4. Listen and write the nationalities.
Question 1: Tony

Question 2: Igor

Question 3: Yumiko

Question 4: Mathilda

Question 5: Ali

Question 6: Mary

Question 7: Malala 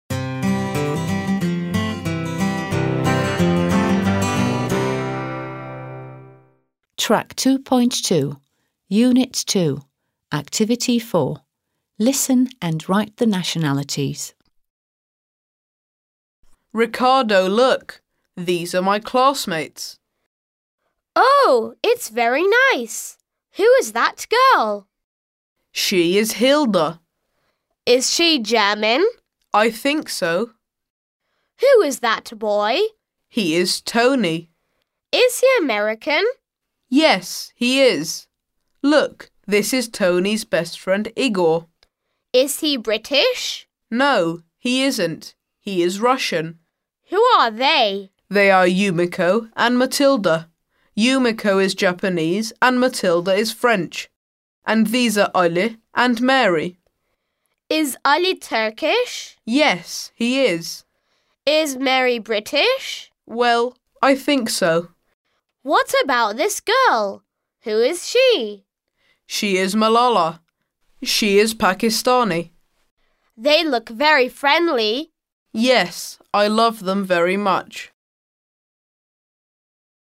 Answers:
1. American
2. Russian
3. Japanese
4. French
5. Turkish
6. British
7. Pakistani

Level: 4. Sınıf